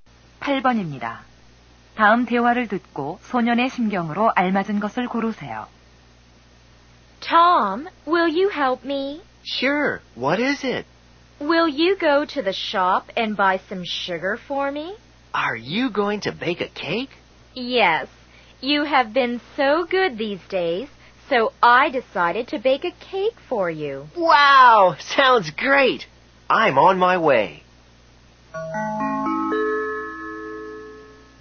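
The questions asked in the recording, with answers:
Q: 다음 대화를 듣고 소년의 심경으로 알맞은 것을 고르세요.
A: 기쁘고 신남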